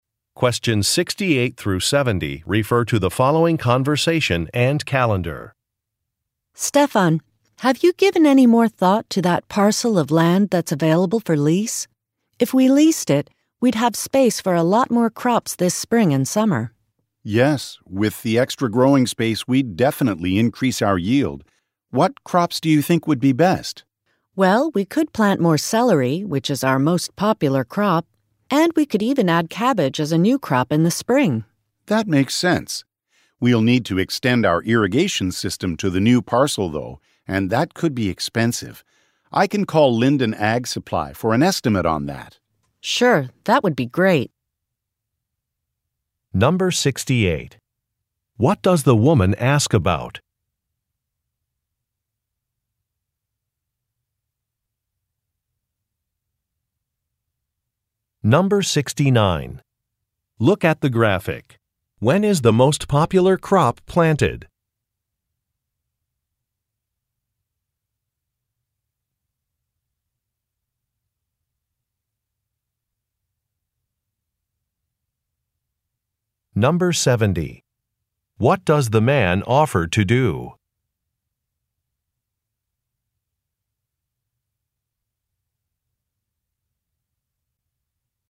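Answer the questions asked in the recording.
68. A parcel of land available for lease
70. Call Linden Ag Supply for an estimate on extending the irrigation system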